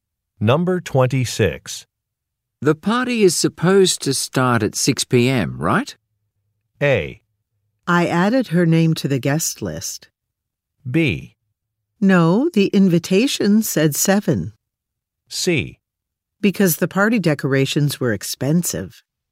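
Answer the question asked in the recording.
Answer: B: No, the invitation said 7.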